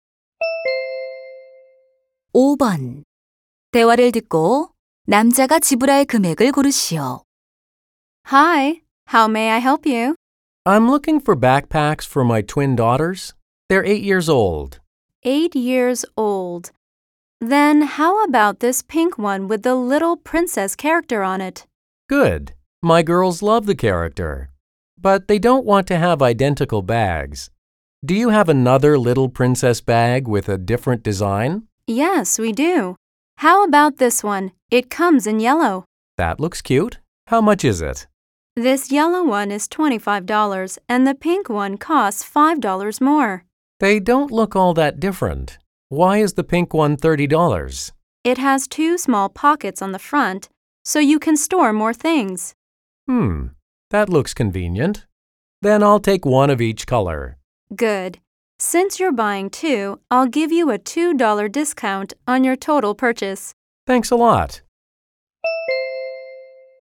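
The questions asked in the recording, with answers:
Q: 대화를 듣고 남자가 지불할 금액을 고르시오.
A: $53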